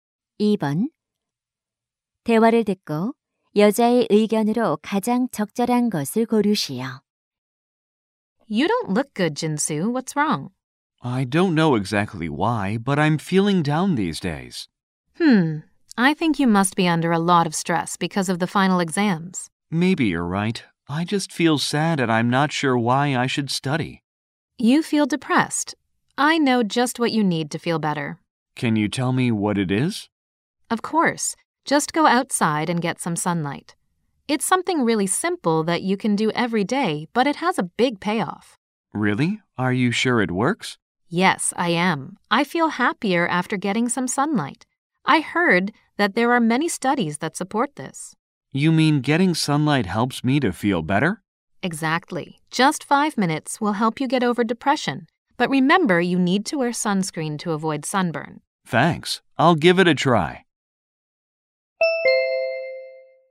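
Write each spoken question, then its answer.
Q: 대화를 듣고 여자의 의견으로 가장 적절한 것을 고르시오.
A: 햇볕을 쬐면 우울감 해소에 도움이 된다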